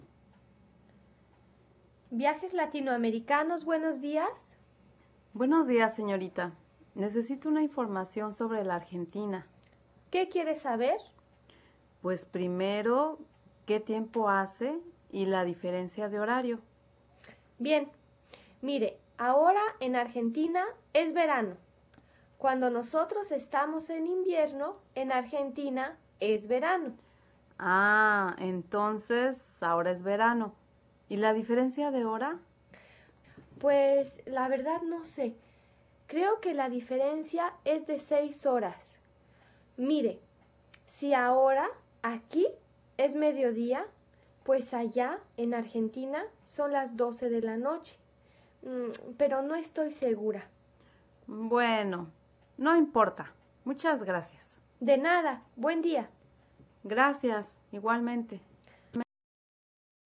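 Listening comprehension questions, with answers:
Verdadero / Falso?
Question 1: Cuando es verano aquí, es invierno en Argentina.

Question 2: Según la recepcionista, la diferencia de hora entre Argentina y aquí es de medianoche.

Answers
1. Verdadero
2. Falso

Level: ESP-1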